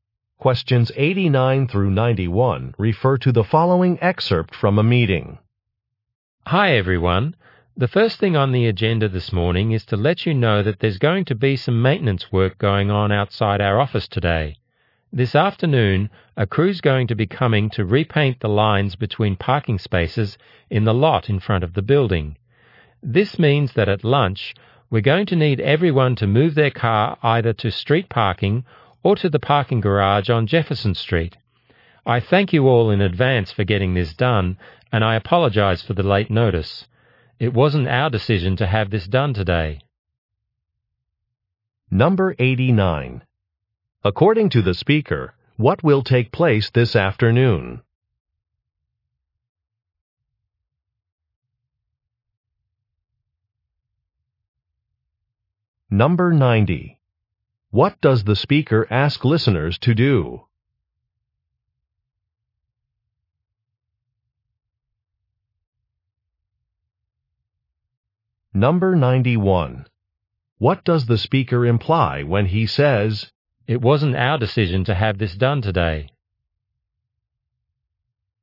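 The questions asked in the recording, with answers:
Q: According to the speaker, what will take place this afternoon?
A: The parking lot lines will be repainted

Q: What does the speaker ask listeners to do?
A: Move their cars

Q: What does the speaker imply when he says,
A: He is not responsible for the short notice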